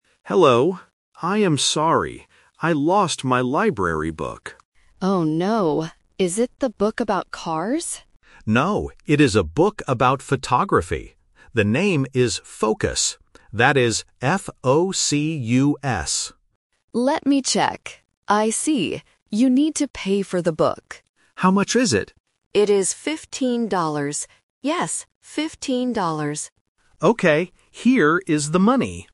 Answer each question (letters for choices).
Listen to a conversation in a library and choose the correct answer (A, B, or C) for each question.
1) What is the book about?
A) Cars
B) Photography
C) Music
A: B

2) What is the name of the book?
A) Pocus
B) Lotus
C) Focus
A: C

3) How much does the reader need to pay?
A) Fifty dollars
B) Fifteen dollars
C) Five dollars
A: B

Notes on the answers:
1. The reader clearly states, "It is a book about photography." Option (A) "Cars" is a trap; the librarian asks if it is a book about cars, but the reader says "No". Option (C) "Music" is a plausible hobby but is not mentioned at all.
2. The reader spells the title of the book out loud: "That is F-O-C-U-S." Option (A) "Pocus" and Option (B) "Lotus" are phonetic traps because they rhyme and sound very similar to "Focus", testing the listener's ability to hear specific starting letters.
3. The librarian states and repeats the price: "It is fifteen dollars. Yes, fifteen dollars." Option (A) "Fifty dollars" is a classic A1 phonetic trap (confusing "-teen" and "-ty"). Option (C) "Five dollars" is a trap using a similar base number but is not the correct amount.